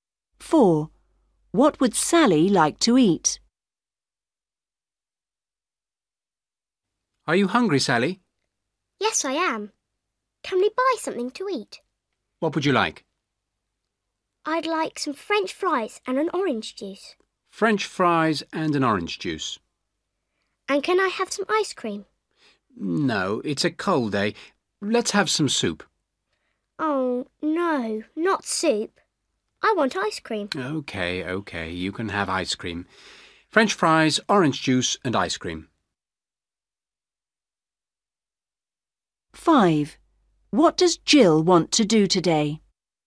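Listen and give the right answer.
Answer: French fries, orange juice and ice cream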